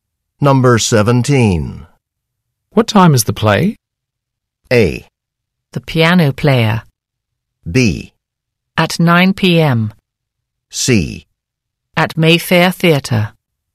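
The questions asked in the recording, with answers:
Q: What time is the play?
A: B: At 9 p.m.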